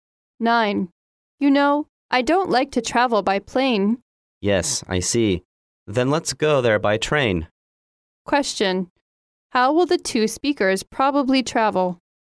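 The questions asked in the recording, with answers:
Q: How will the two speakers probably travel?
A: By train.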